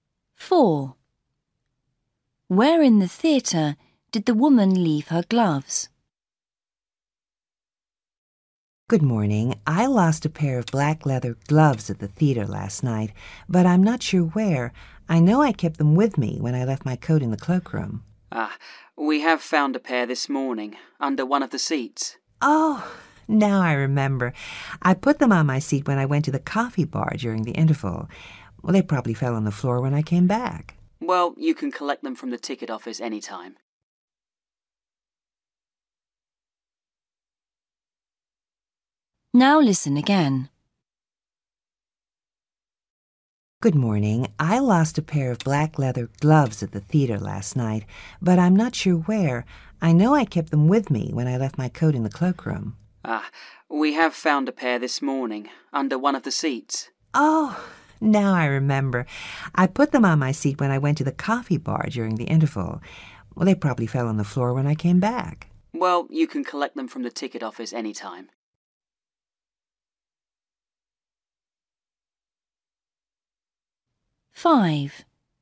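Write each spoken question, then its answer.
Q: Where in the theatre did the woman leave her gloves?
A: on her seat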